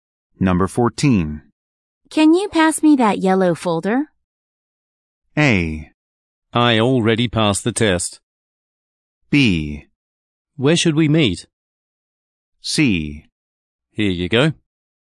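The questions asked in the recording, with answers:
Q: Can you pass me that yellow folder?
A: C: Here you go.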